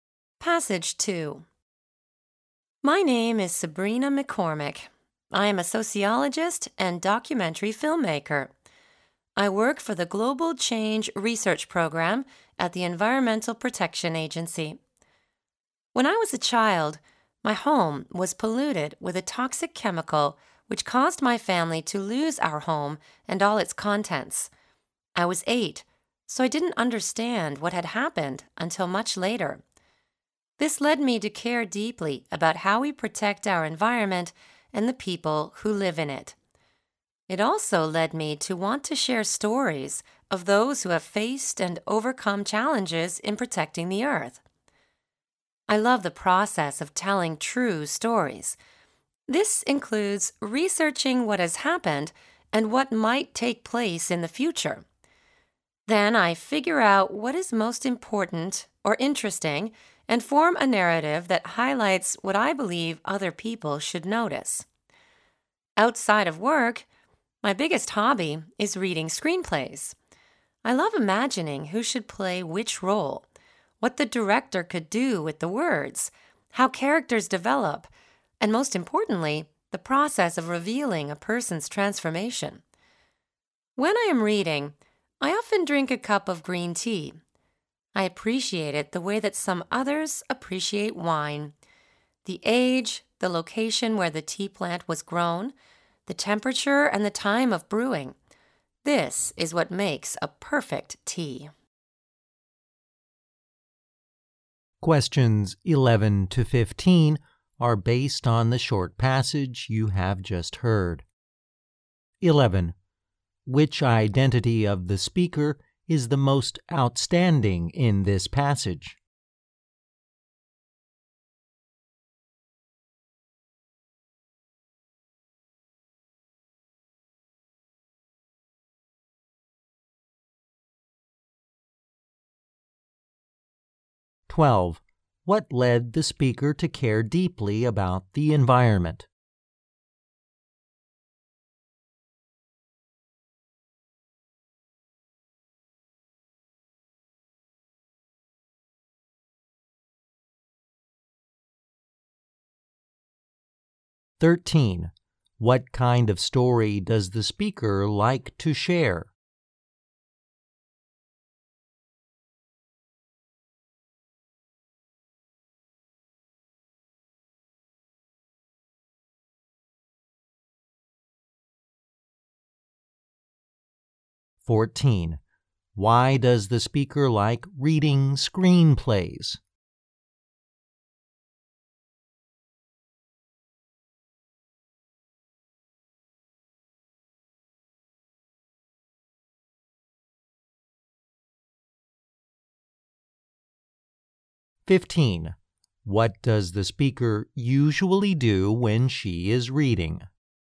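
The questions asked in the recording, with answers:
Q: What led the speaker to care deeply about the environment?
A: Her childhood home was polluted with a toxic chemical, and her family lost the home.

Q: What kind of story does the speaker like to share?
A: Stories of people who have faced and overcome challenges in protecting the earth

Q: What does the speaker usually do when she is reading?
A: She drinks a cup of green tea.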